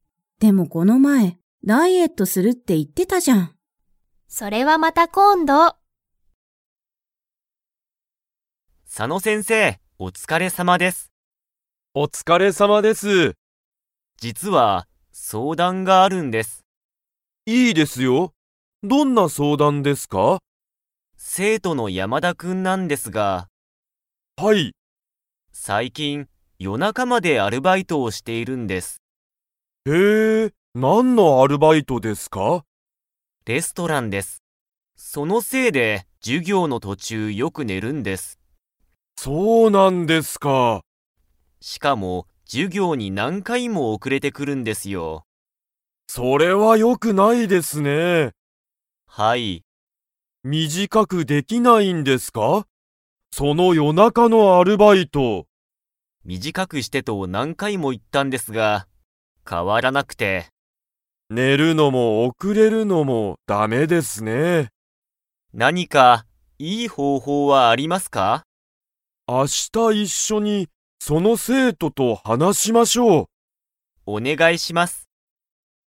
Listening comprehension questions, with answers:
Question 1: 山田やまだ君くんは、夜中よなかまで何なにをしていますか?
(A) 勉強べんきょう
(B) ゲーム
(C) アルバイト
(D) 授業じゅぎょう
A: アルバイト

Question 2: 佐野さの先生せんせいと鈴木すずき先生せんせいは、明日あした山田やまだ君くんと 。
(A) 話はなす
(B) 話はなさない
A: 話はなす

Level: Level 4

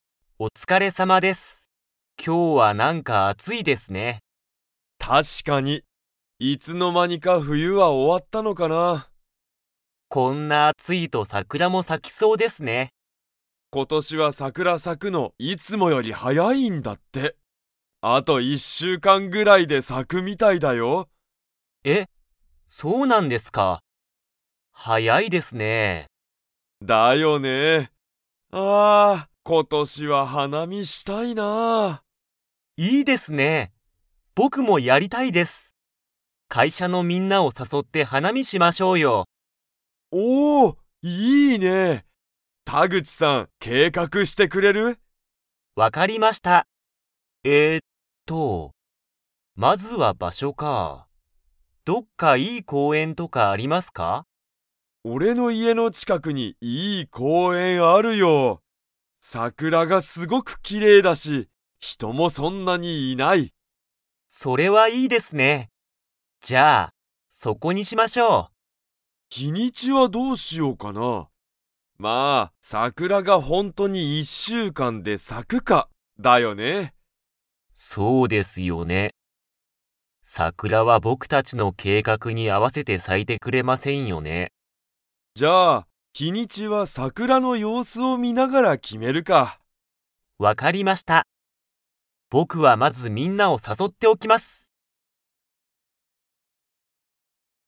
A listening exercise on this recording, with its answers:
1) 田口たぐちさんと石井いしいさんは、花見はなみをどこでやりたいと思おもっていますか?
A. 会社かいしゃ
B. 公園こうえん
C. 石井いしいさんの家いえ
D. 一週間いっしゅうかん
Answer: 公園こうえん

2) 田口たぐちさんは、会社かいしゃのみんなを 。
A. 誘さそう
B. 誘さそわない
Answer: 誘さそう

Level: Level 4

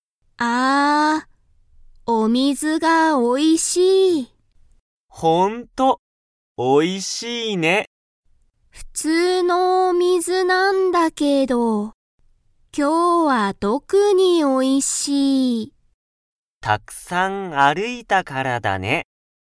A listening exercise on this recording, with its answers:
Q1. ハルとユタカは、たくさん歩(ある)きましたか?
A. はい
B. いいえ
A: はい

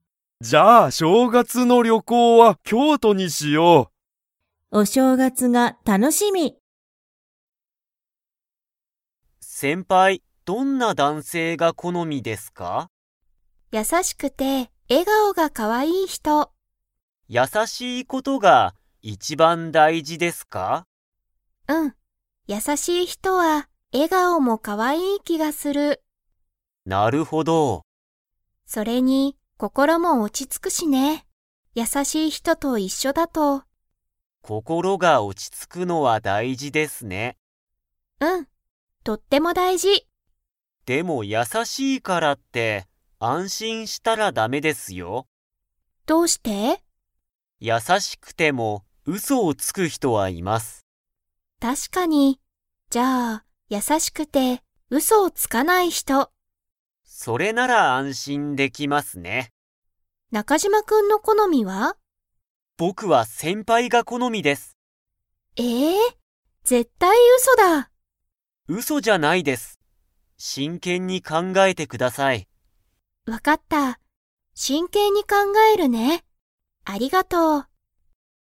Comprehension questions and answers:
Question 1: 佐竹さたけさんは、どんな男性だんせいが好このみですか?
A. 若わかい人ひと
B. 優やさしい人ひと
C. 賢かしこい人ひと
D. うそをつく人ひと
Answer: 優やさしい人ひと

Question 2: 中島なかじま君くんは、佐竹さたけさんが 。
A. 好このみだ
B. 好このみじゃない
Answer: 好このみだ

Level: Level 4

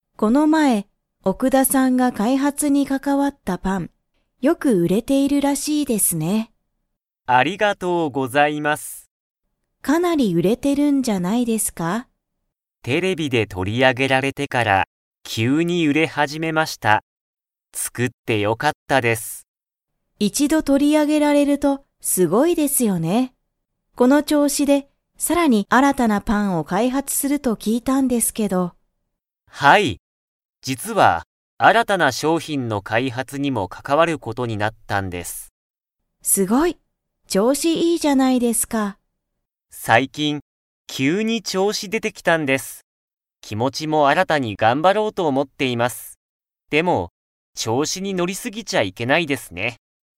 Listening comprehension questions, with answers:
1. パンは、なぜよく売うれるようになりましたか?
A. 奥田おくださんが開発かいはつしたから。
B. 野村のむらさんが売うったから。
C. 新あたらしいパンだから。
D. テレビで取とり上あげられたから。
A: テレビで取とり上あげられたから。

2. 奥田おくださんは、新あらたなパンの開発かいはつに 。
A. 関かかわる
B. 関かかわらない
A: 関かかわる

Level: Level 4

